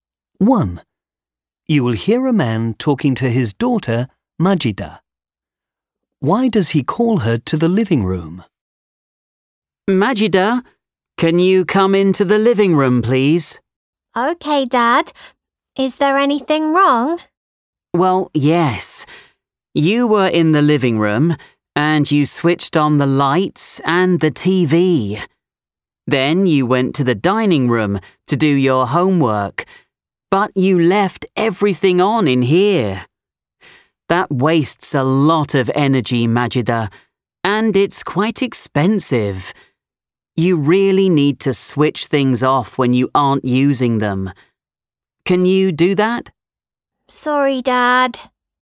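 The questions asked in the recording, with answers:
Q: Why does he call her to the living room?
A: She left the lights and TV on, which wastes energy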